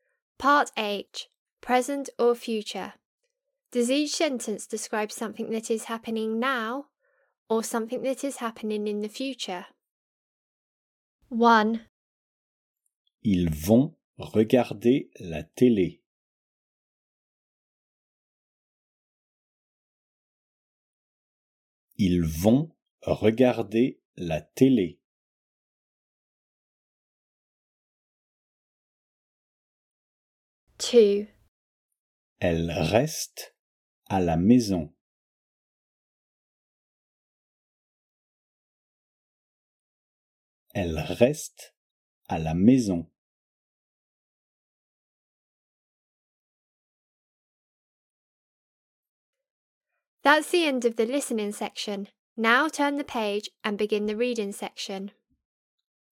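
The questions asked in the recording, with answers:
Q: Ils vont regarder la télé.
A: future

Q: Elle reste à la maison.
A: happening now (present)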